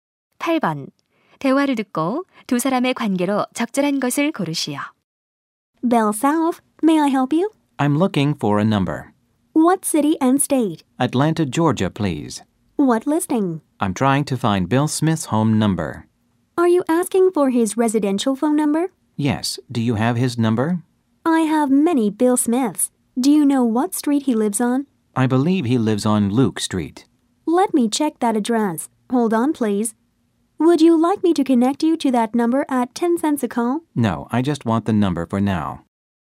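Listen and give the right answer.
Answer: 전화번호 안내원 - 고객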